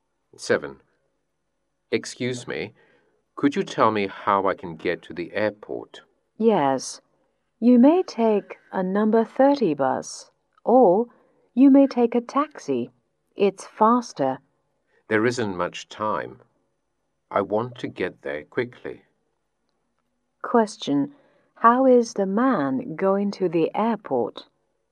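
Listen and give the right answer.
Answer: By taxi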